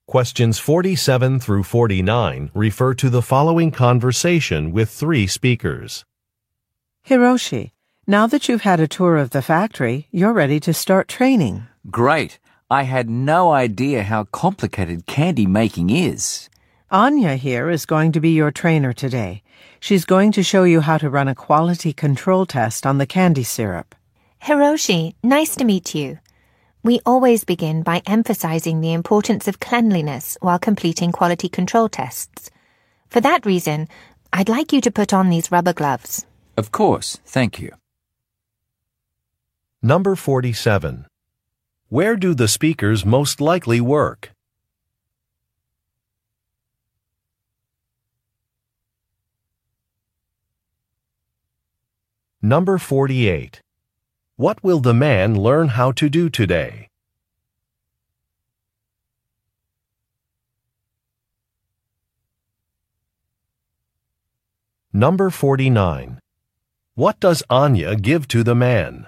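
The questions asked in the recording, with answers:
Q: Where do the speakers most likely work?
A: At a candy factory

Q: What will the man learn how to do today?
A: Run a quality control test on the candy syrup

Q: What does Anya give to the man?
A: Rubber gloves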